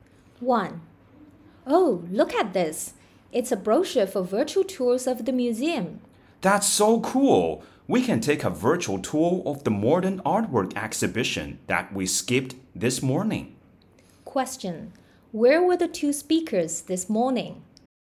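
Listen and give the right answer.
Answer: At the museum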